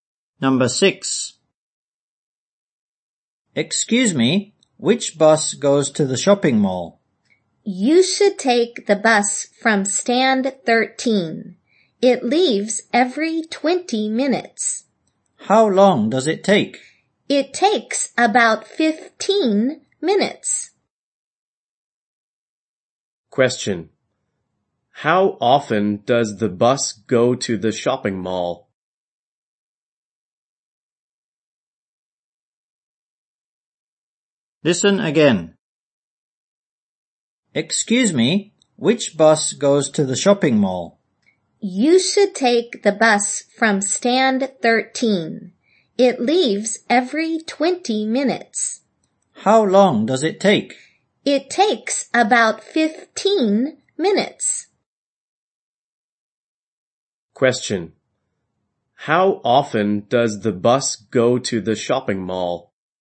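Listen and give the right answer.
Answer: Every 20 minutes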